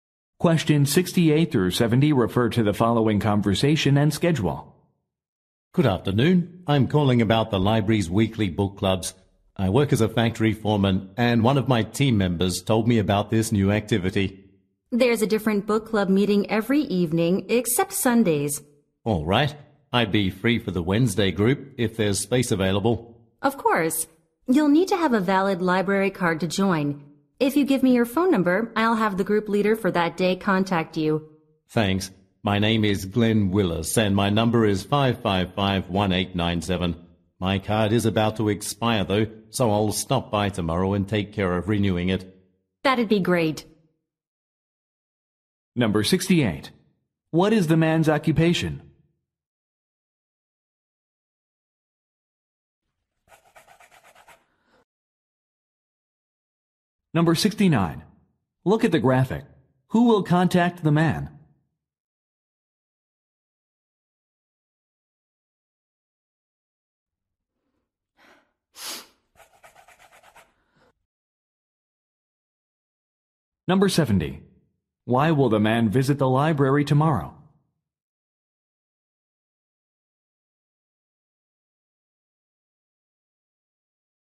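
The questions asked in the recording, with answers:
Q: What is the man's occupation?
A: Factory foreman

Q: Why will the man visit the library tomorrow?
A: To renew his library card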